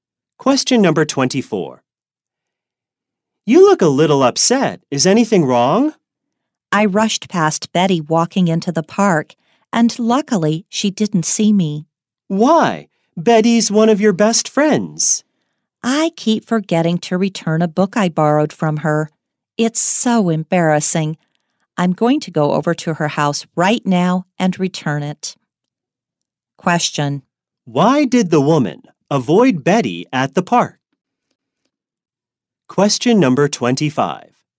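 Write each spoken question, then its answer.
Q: Why did the woman avoid Betty at the park?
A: She hasn't returned a book she borrowed from Betty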